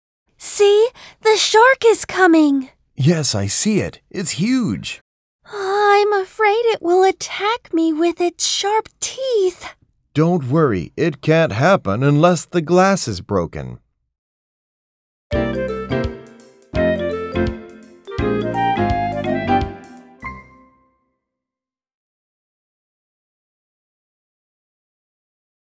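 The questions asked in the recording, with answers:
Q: Where are they now?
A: At an aquarium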